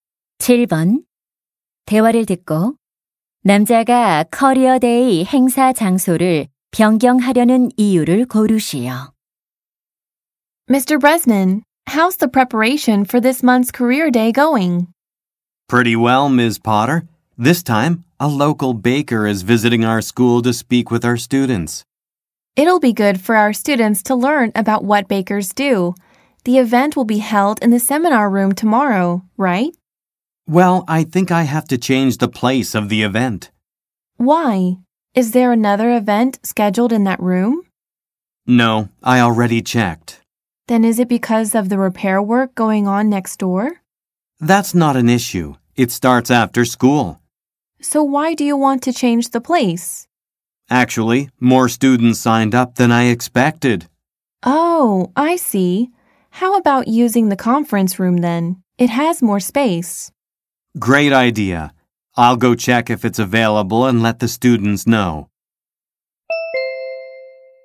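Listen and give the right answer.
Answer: 예상보다 많은 학생이 신청해서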